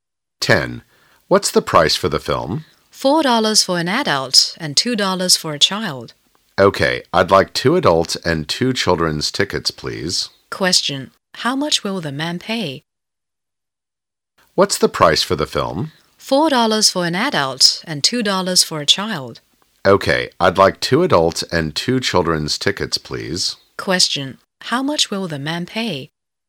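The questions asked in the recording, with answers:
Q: How much will the man pay?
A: $12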